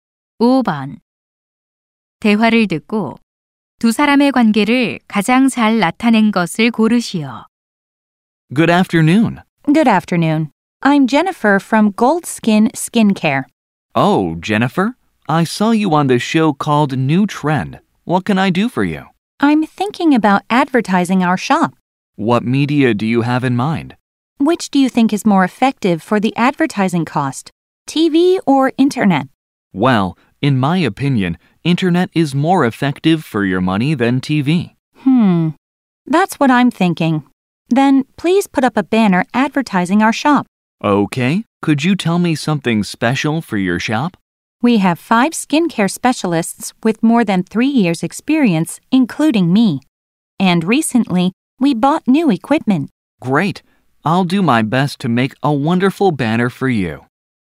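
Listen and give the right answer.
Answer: 피부관리실 운영자 - 광고 제작자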